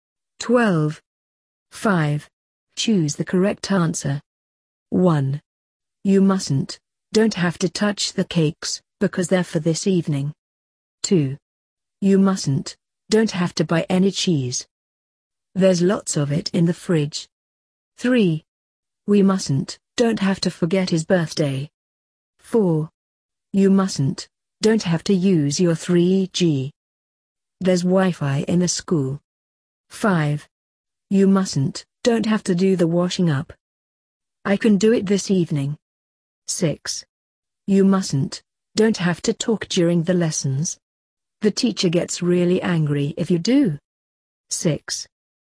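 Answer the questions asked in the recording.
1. mustn't
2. don't have to
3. mustn't
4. don't have to
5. don't have to
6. mustn't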